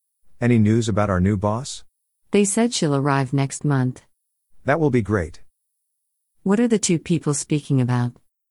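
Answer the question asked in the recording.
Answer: Their new boss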